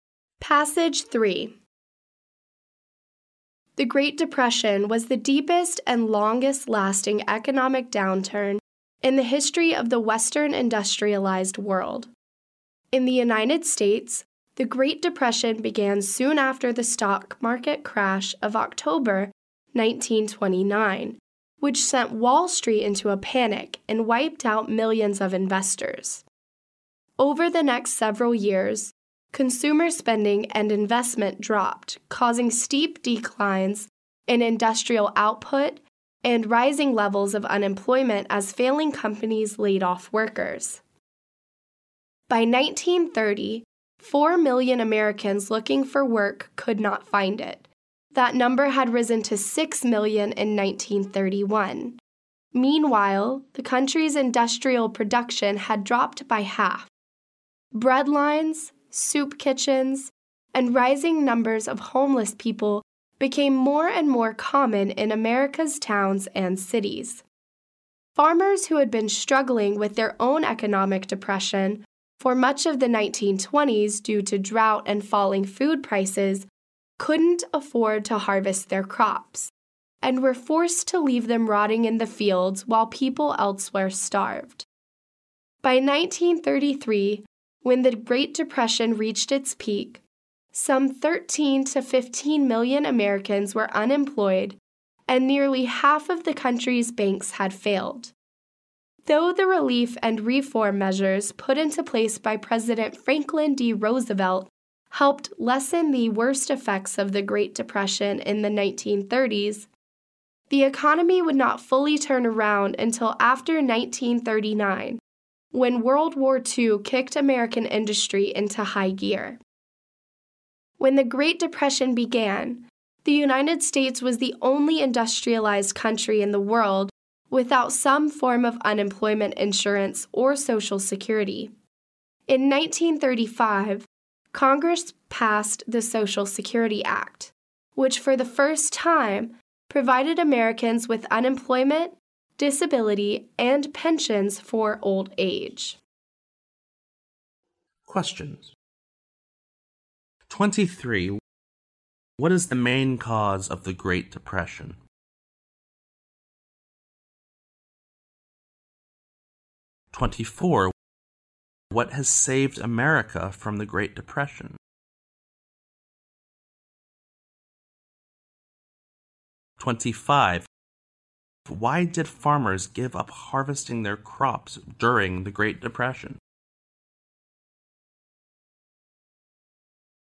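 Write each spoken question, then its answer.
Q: What is the main cause of the Great Depression?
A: The stock market crash of October 1929

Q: What has saved America from the Great Depression?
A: World War II

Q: Why did farmers give up harvesting their crops during the Great Depression?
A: They couldn't afford it, because of drought and falling food prices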